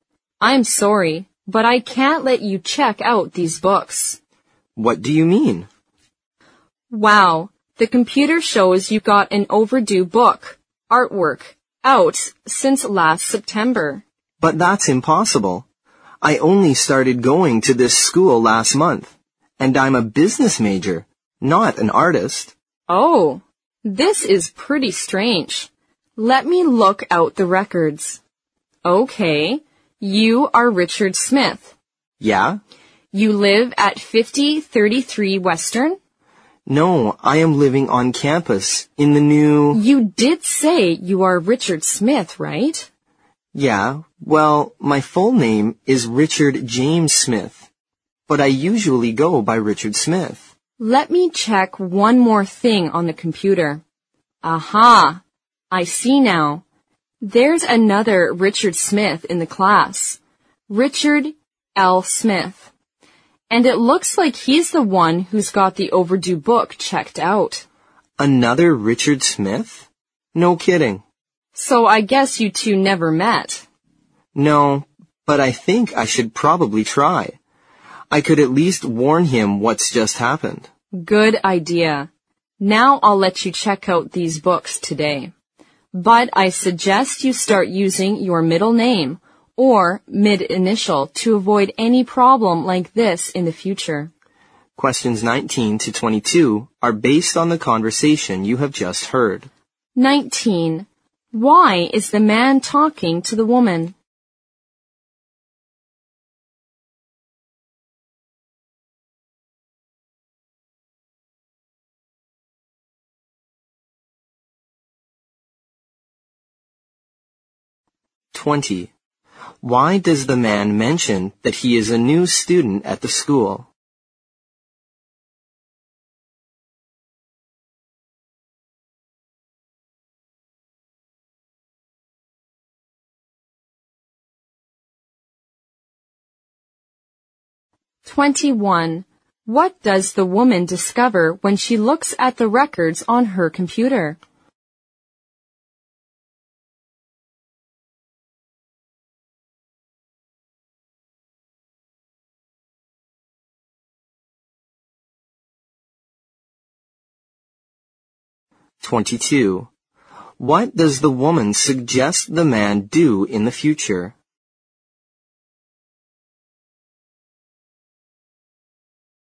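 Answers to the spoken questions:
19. He wants to check out library books.
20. To show he couldn't have an overdue book out since last September.
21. Another student named Richard Smith has the overdue book.
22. Use his middle name or middle initial.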